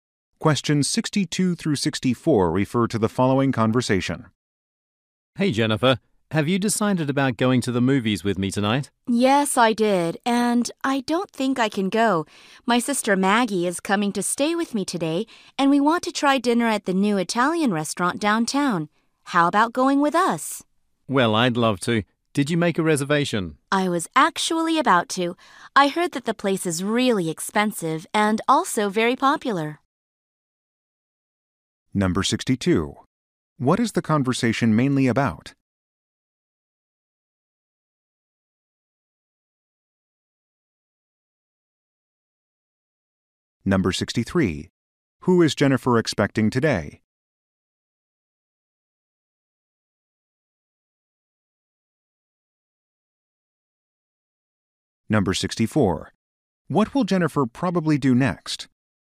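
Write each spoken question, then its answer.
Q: What is the conversation mainly about?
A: Evening plans

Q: Who is Jennifer expecting today?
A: Her sister Maggie

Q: What will Jennifer probably do next?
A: Make a restaurant reservation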